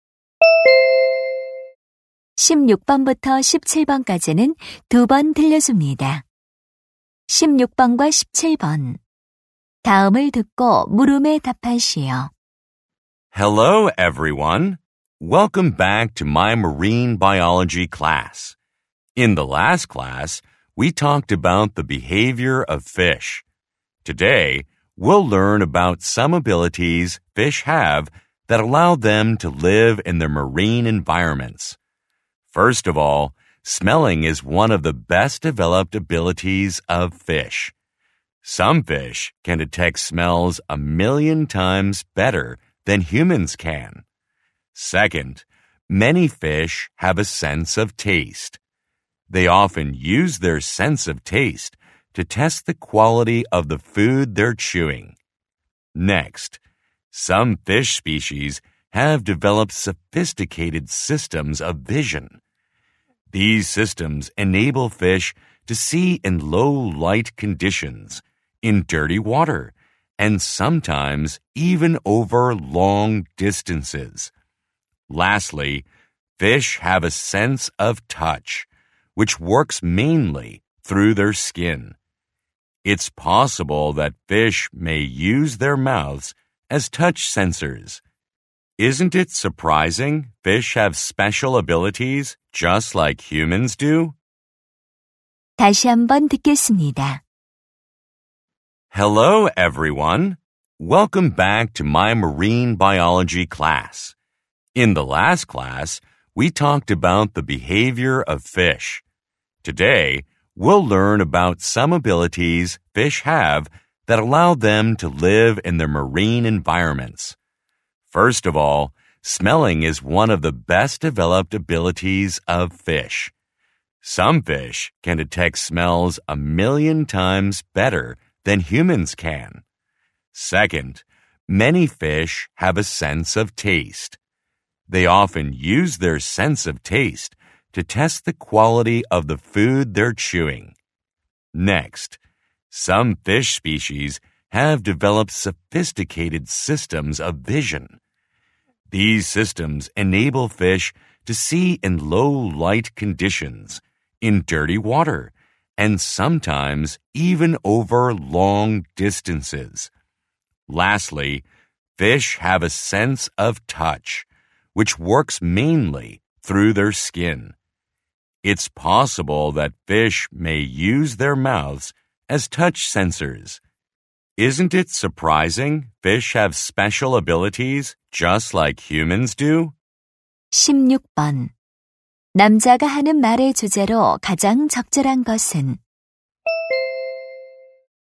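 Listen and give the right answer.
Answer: 물고기가 해양 환경에서 살 수 있게 해 주는 감각 능력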